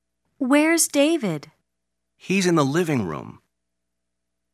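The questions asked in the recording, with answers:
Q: Where's David?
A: In the living room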